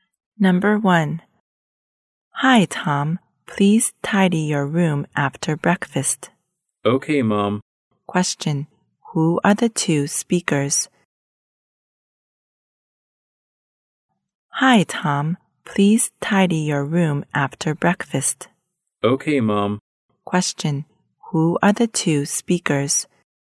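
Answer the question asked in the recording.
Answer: Mother and son (Tom and his mom)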